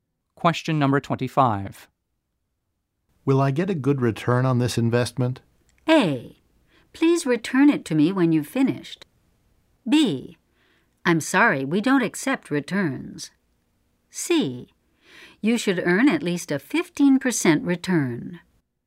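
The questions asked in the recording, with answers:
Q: Will I get a good return on this investment?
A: C: You should earn at least a 15% return.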